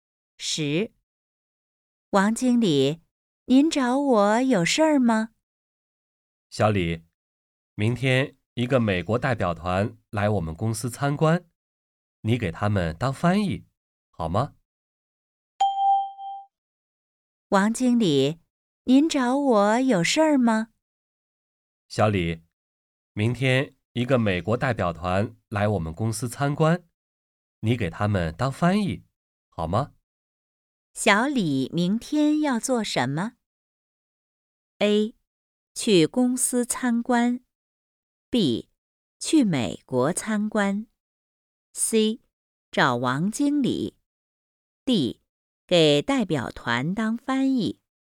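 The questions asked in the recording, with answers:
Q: 小李明天要做什么?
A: D: 给代表团当翻译。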